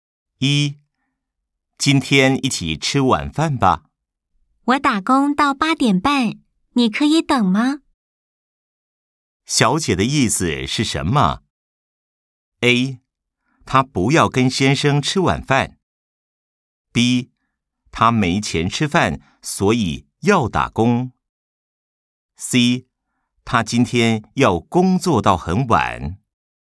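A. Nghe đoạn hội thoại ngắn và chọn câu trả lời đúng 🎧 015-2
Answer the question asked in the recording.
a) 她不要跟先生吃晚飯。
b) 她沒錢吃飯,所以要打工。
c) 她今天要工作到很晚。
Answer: c) 她今天要工作到很晚。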